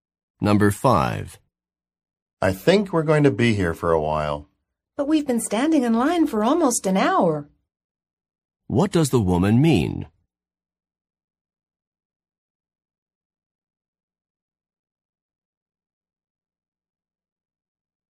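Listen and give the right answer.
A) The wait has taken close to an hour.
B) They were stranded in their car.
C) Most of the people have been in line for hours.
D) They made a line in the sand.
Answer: A) The wait has taken close to an hour.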